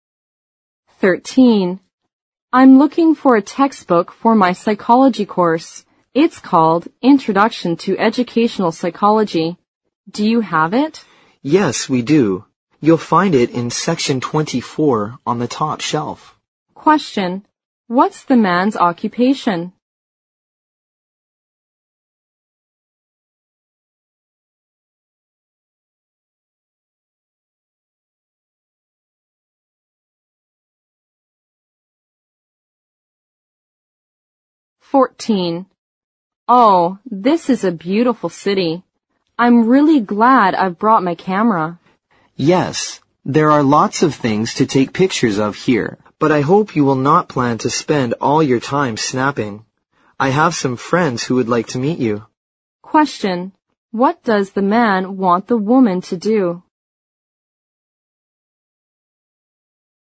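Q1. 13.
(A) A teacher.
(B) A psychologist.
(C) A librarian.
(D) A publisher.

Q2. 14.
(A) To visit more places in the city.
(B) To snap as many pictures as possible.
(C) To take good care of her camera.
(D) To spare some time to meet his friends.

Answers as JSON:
{"1": "C", "2": "D"}

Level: 六级

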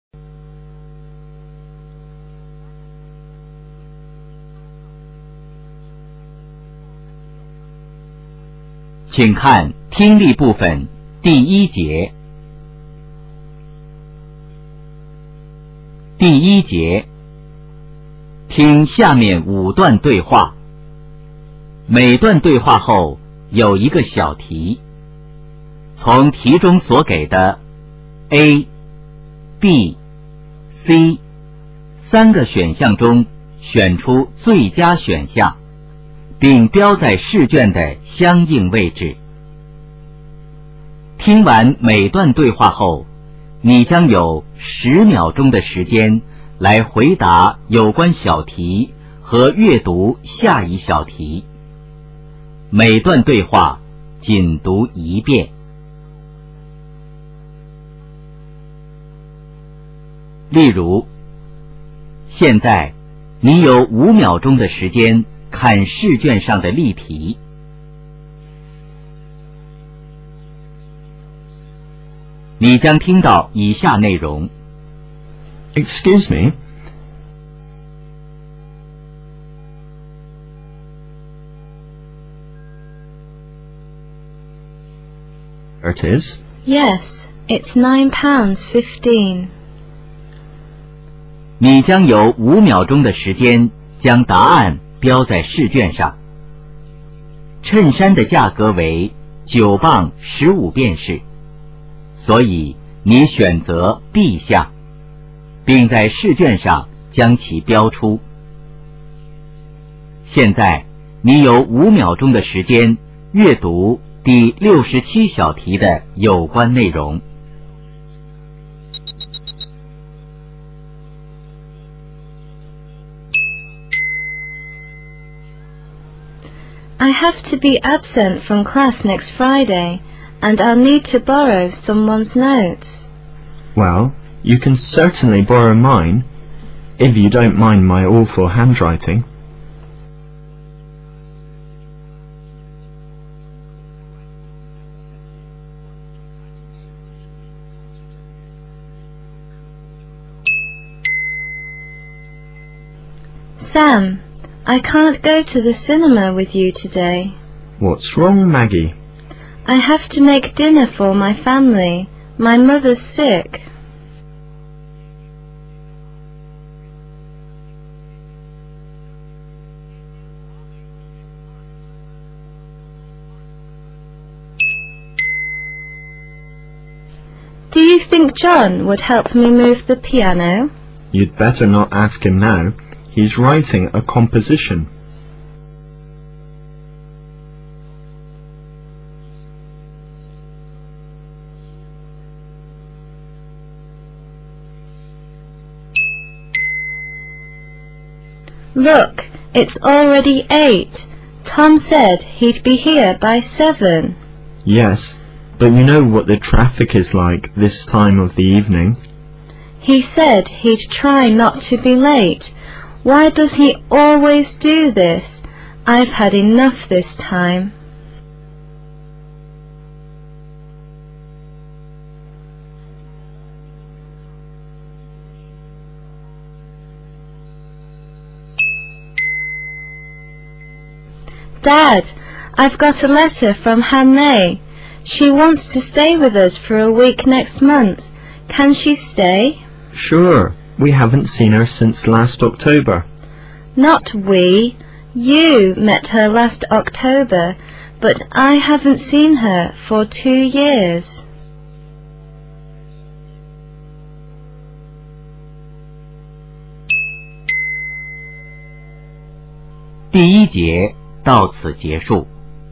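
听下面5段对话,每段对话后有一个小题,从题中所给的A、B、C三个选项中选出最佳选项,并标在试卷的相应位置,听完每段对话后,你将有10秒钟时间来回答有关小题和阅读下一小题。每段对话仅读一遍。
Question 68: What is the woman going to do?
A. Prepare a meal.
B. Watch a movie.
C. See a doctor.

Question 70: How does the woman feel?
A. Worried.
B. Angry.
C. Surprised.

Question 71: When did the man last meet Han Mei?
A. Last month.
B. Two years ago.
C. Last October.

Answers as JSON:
{"68": "A", "70": "B", "71": "C"}

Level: 高考

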